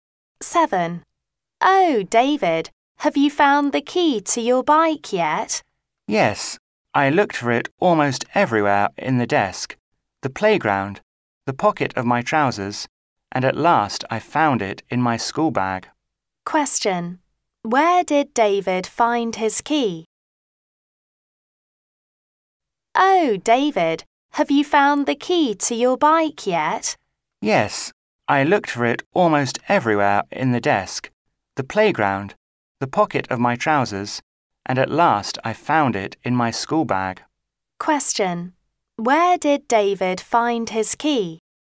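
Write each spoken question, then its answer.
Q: Where did David find his key?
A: In his school bag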